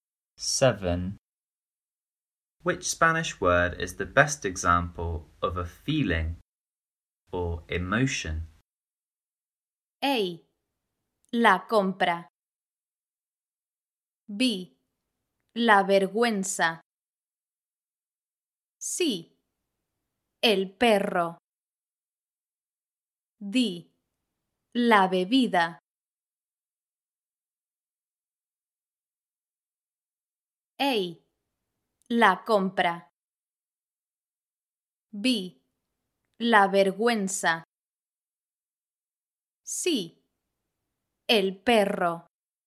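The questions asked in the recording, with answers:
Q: Which Spanish word is the best example of a feeling or emotion?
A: B: La vergüenza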